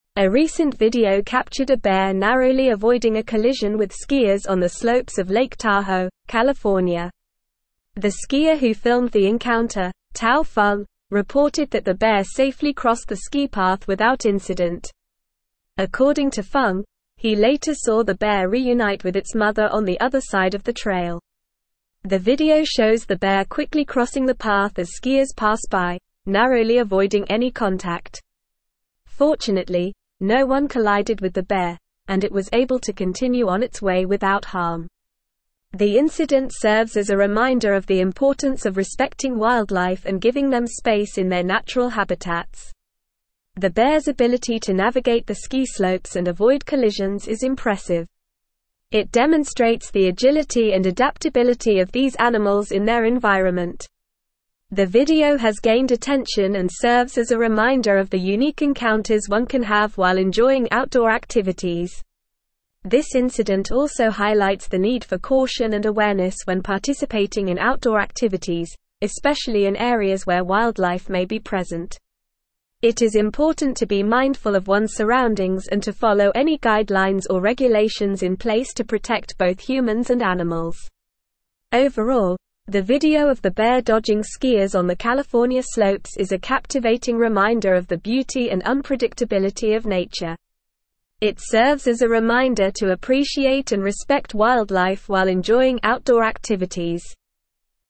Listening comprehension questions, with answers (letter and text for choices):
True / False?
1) The incident serves as a reminder to respect wildlife and give them space in their natural habitats.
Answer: True

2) The skier who filmed the encounter reported that the bear safely crossed the ski path without incident.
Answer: True

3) A bear was caught on video colliding with skiers in Lake Tahoe, California.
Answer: False

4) The bear was able to reunite with its mother on the other side of the trail.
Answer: True

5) Someone collided with the bear, and it was unable to continue on its way without harm.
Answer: False

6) The video shows the bear slowly crossing the path as skiers pass by, avoiding any contact.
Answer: False

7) The bear's inability to navigate the ski slopes and avoid collisions demonstrates their lack of agility and adaptability.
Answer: False

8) Where did the video capture the bear narrowly avoiding a collision with skiers?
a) Lake Michigan, Illinois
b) Lake Superior, Minnesota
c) Lake Powell, Arizona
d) Lake Tahoe, California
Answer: d) Lake Tahoe, California

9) Who filmed the encounter between the bear and skiers?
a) Tao Feng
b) Sarah Johnson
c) Michael Thompson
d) Emily Davis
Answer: a) Tao Feng

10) What happened to the bear after it crossed the ski path?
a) It reunited with its mother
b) It continued skiing down the slope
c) It collided with a skier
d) It ran away into the woods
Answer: a) It reunited with its mother

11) What does the video demonstrate about the bear?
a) Its fear of skiers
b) Its love for skiing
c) Its inability to navigate ski slopes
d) Its agility and adaptability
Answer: d) Its agility and adaptability

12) What does the incident serve as a reminder of?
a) The dangers of skiing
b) The importance of respecting wildlife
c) The need for more ski slopes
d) The beauty of Lake Tahoe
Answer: b) The importance of respecting wildlife

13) What should people be mindful of when participating in outdoor activities?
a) The weather forecast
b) The time of day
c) Their surroundings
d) The price of ski lift tickets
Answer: c) Their surroundings

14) What does the video highlight the need for?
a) More ski slopes in California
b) Caution and awareness in outdoor activities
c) The importance of wearing ski helmets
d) The need for more bears on ski slopes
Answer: b) Caution and awareness in outdoor activities

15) The skier who filmed the (1)______, Tao Feng, reported that the bear safely (2)______ the ski path without incident.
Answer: encounter

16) The skier who filmed the (1)______, Tao Feng, reported that the bear safely (2)______ the ski path without incident.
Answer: crossed

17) According to Feng, he later saw the bear reunite with its m(3)______ on the other side of the (4)______.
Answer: trail

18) The (5)______ serves as a (6)______ of the importance of respecting (7)______ and giving them space in their natural habitats.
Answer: incident

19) The (5)______ serves as a (6)______ of the importance of respecting (7)______ and giving them space in their natural habitats.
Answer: reminder

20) The (5)______ serves as a (6)______ of the importance of respecting (7)______ and giving them space in their natural habitats.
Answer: wildlife

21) The bear's ability to (8)______ the ski slopes and avoid collisions is impressive.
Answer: navigate

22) It demonstrates the agility and adaptability of these animals in their (9)______.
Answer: environment

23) The video has gained (10)______ and serves as a reminder of the unique encounters one can have while (11)______ outdoor (12)______.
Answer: attention

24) The video has gained (10)______ and serves as a reminder of the unique encounters one can have while (11)______ outdoor (12)______.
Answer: enjoying

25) The video has gained (10)______ and serves as a reminder of the unique encounters one can have while (11)______ outdoor (12)______.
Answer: activities

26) It is important to be mindful of one's surroundings and to follow any guidelines or (13)______ in (14)______ to protect both (15)______ and animals.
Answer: regulations

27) It is important to be mindful of one's surroundings and to follow any guidelines or (13)______ in (14)______ to protect both (15)______ and animals.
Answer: place

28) It is important to be mindful of one's surroundings and to follow any guidelines or (13)______ in (14)______ to protect both (15)______ and animals.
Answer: humans

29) It serves as a reminder to appreciate and respect wildlife while enjoying (16)______ activities.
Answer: outdoor

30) What did Tao Feng report about the bear's encounter with skiers on the slopes of Lake Tahoe?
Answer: Tao Feng reported that the bear safely crossed the ski path without incident.

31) How did the bear navigate the ski path without incident?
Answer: The bear navigated the ski path by quickly crossing it as skiers passed by, narrowly avoiding any contact.

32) What did the skier who filmed the video later see the bear do?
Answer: The skier who filmed the video later saw the bear reunite with its mother on the other side of the trail.

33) What does the video demonstrate about the bear's abilities?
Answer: The video demonstrates the bear's agility and adaptability in navigating the ski slopes and avoiding collisions.

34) What is the overall message of the video?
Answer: The overall message of the video is to appreciate and respect wildlife while enjoying outdoor activities.

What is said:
A recent video captured a bear narrowly avoiding a collision with skiers on the slopes of Lake Tahoe, California. The skier who filmed the encounter, Tao Feng, reported that the bear safely crossed the ski path without incident. According to Feng, he later saw the bear reunite with its mother on the other side of the trail.
The video shows the bear quickly crossing the path as skiers pass by, narrowly avoiding any contact. Fortunately, no one collided with the bear, and it was able to continue on its way without harm. The incident serves as a reminder of the importance of respecting wildlife and giving them space in their natural habitats.
The bear's ability to navigate the ski slopes and avoid collisions is impressive. It demonstrates the agility and adaptability of these animals in their environment. The video has gained attention and serves as a reminder of the unique encounters one can have while enjoying outdoor activities.
This incident also highlights the need for caution and awareness when participating in outdoor activities, especially in areas where wildlife may be present. It is important to be mindful of one's surroundings and to follow any guidelines or regulations in place to protect both humans and animals.
Overall, the video of the bear dodging skiers on the California slopes is a captivating reminder of the beauty and unpredictability of nature. It serves as a reminder to appreciate and respect wildlife while enjoying outdoor activities.

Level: Level 4